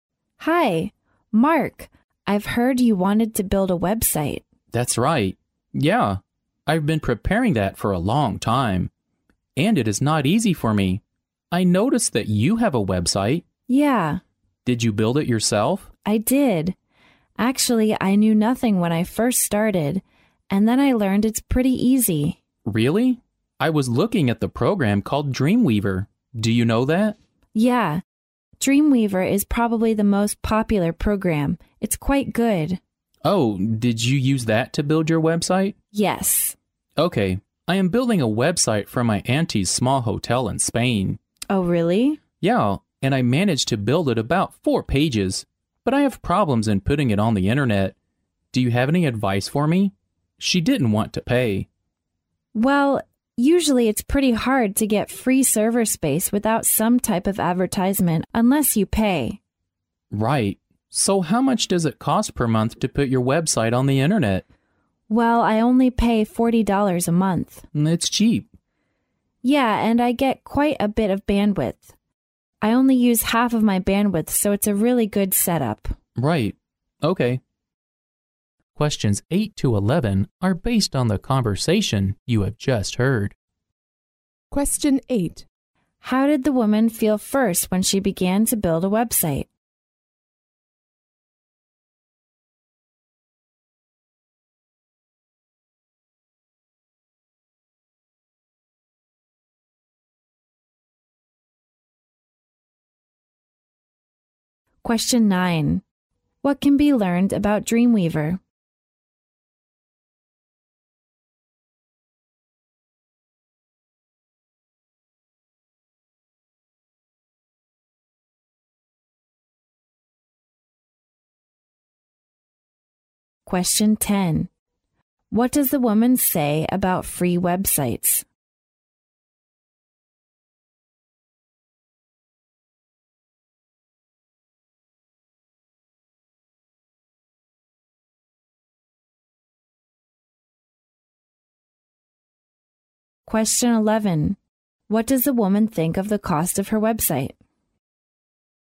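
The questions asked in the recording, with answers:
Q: What can be learned about Dreamweaver?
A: It is probably the most popular program for building websites.

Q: What does the woman say about free websites?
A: It is hard to get free server space without some kind of advertising.

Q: What does the woman think of the cost of her website?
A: She thinks it is cheap.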